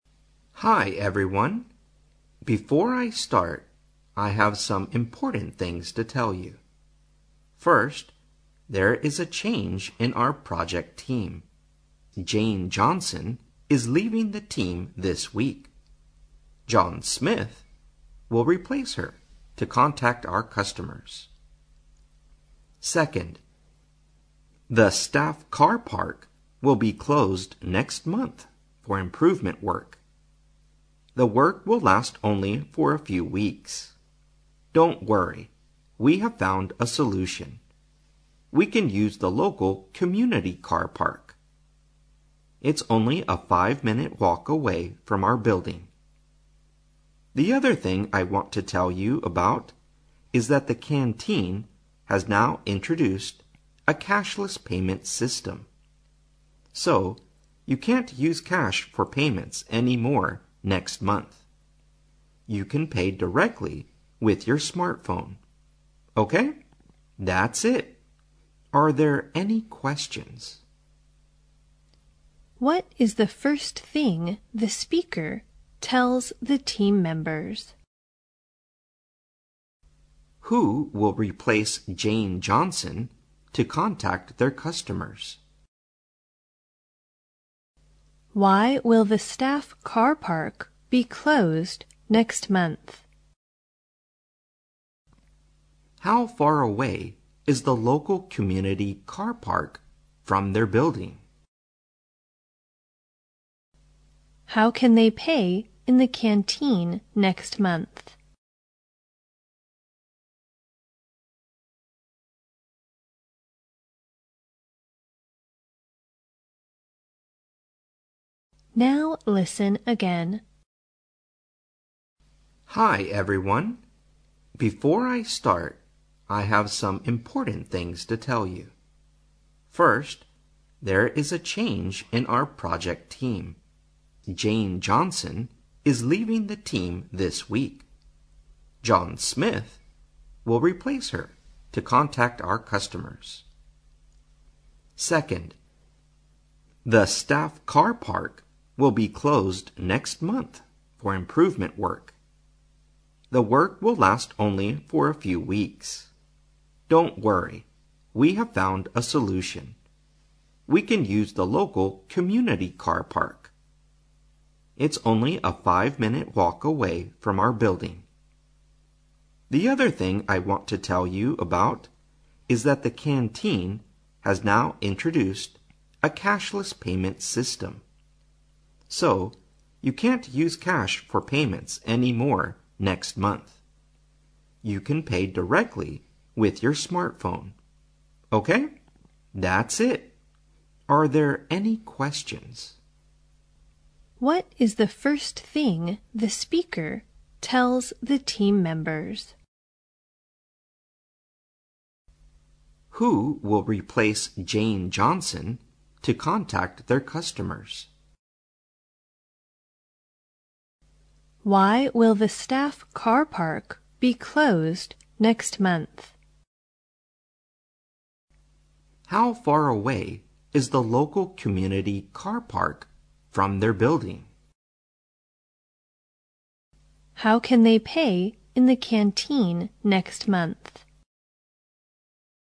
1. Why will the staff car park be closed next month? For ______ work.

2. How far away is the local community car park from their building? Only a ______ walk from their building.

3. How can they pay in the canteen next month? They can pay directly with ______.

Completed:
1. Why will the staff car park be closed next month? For improvement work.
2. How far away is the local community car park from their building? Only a five-minute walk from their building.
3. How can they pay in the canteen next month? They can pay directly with their smartphone.

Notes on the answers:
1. 题目询问员工停车场下个月关闭的原因。说话人在提到员工停车场将在下个月关闭时,便提到了原因:for improvement work,故填入improvement"升级"。
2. 题目询问本地社区的停车场距离他们的大楼有多远。说话人提到员工可以使用本地社区的停车场,并表示停车场距离他们的大楼只有5分钟的步行路程,故填入five-minute"5分钟"。注意空格前有不定冠词a,这里不能写成five minutes。
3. 题目询问员工下个月在食堂如何付钱。说话人最后提到,可以直接用你们的智能手机付钱,由于空格前的主语是They,因此填their smartphone"他们的智能手机"。

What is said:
Before I start, I have some important things to tell you. First, there is a change in our project team. Jane Johnson is leaving the team this week. John Smith will replace her to contact our customers. Second, the staff car park will be closed next month for improvement work. The work will last only for a few weeks. Don't worry, we have found a solution. We can use the local community car park. It's only a 5-minute walk away from our building. The other thing I want to tell you about is that the canteen has now introduced a cashless payment system. So, you can't use cash for payments any more next month. You can pay directly with your smartphone. That's it. Are there any questions? What is the first thing the speaker tells the team members?